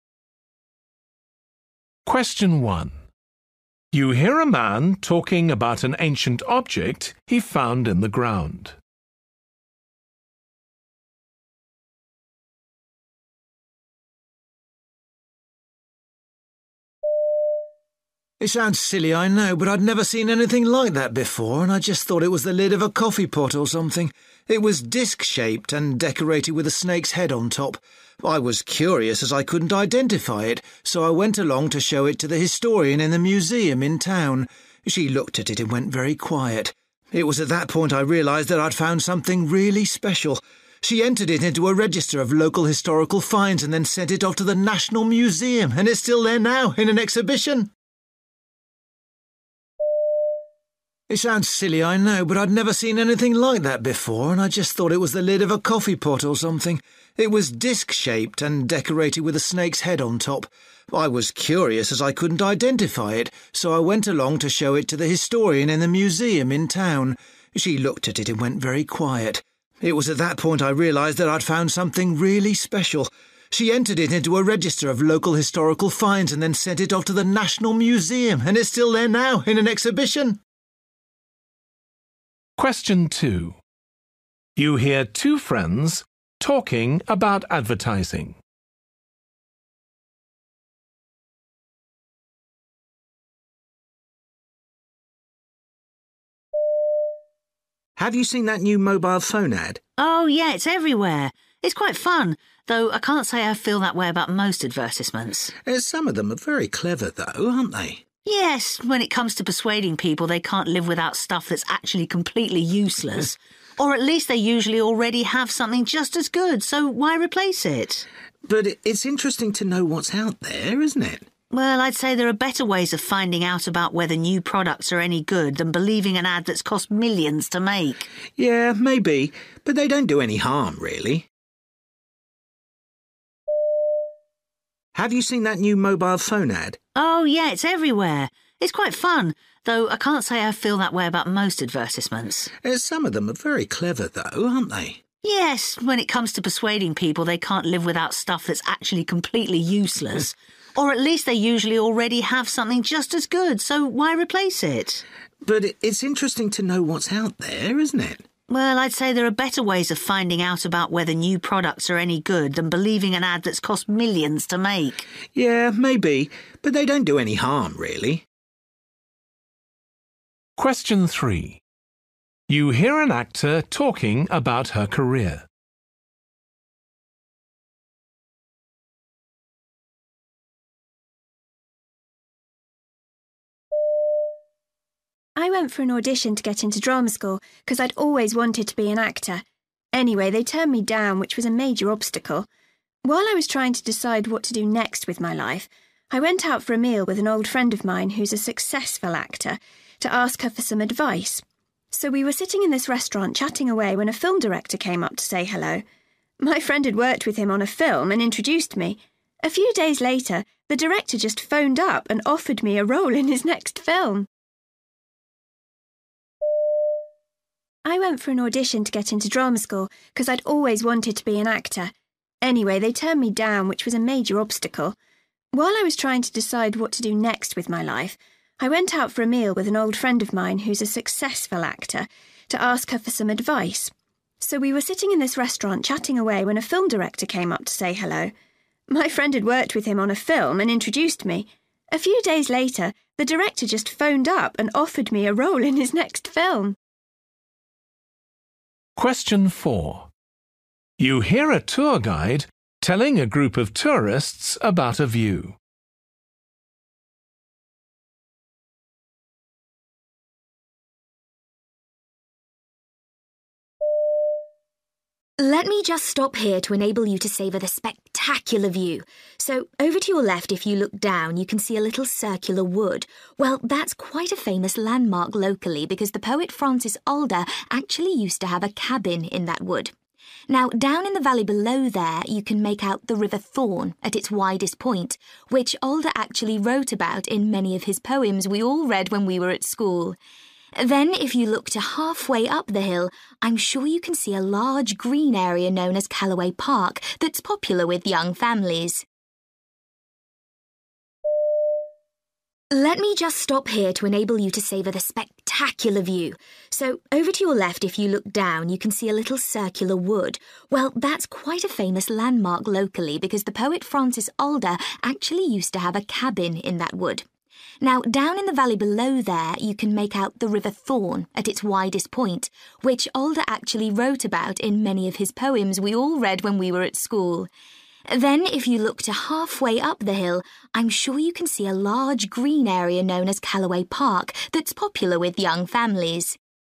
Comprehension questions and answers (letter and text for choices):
For questions 1-8, choose the best answer A, B or C.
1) The man took the object to a museum because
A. he thought it might be valuable.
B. he decided to record his find.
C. he wanted to know what it was.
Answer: C. he wanted to know what it was.

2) What does the woman say about advertisements?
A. They are merely a form of entertainment.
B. They make people by things they don't need.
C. They give people misleading information about new products.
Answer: B. They make people by things they don't need.

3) What does she say about how she became an actor?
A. She had a chance meeting with someone.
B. She was successful at drama school.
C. She asked her friend to help her.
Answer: A. She had a chance meeting with someone.

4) Which feature does the guide think will be most familiar to them?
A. the park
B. the river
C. the wood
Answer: B. the river

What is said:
1
Man: It sounds silly, I know, but I'd never seen anything like that before and I just thought it was the lid of a coffee pot or something. It was disc-shaped and decorated with a snake's head on top. I was curious as I couldn't identify it, so I went along to show it to the historian in the museum in town. She looked at it and went very quiet. It was at that point I realised that I'd found something really special. She entered it into a register of local historical finds and then sent it off to the National Museum and it's still there now in an exhibition!
2
Man: Have you seen that new mobile phone ad?
Woman: Oh year, it's everywhere. It's quite fun, though I can't say I feel that way about most advertisements.
Man: Some of them are very clever, though, aren't they?
Woman: Yes, when it comes to persuading people they can't live without stuff that's actually completely useless! Or at least they usually already have something just as good, so why replace it?
Man: But it's interesting to know what's out there, isn't it?
Woman: Well I'd say there are better ways of finding out about whether new products are any good than believing an ad that's cost millions to make!
Man: Yeah, maybe, but they don't do any harm, really.
Woman: I went for an audition to get into drama school cos I'd always wanted to be an actor. Anyway, they turned me down, which was a major obstacle. While I was trying to decide what to do next with my life, I went out for a meal with an old friend of mine who's a successful actor, to ask her for some advice. So we were sitting in this restaurant chatting away when a film director came up to say hello. My friend's worked with him on a film and introduced me. A few days later, the director just phoned up and offered me a role in his next film!
4
Woman: Let me just stop here to enable you to savour the spectacular view. So over to your left, if you look down you can see a little circular wood. Well that's quite a famous landmark locally because the poet Francis Alder actually used to have a cabin in that wood. Now down in the valley below there you can make out the River Thorn at its widest point, which Alder actually wrote about in many of his poems we all read when we were at school. Then if you look to halfway up the hill I'm sure you can see a large green area known as Callaway Park that's popular with young families.
5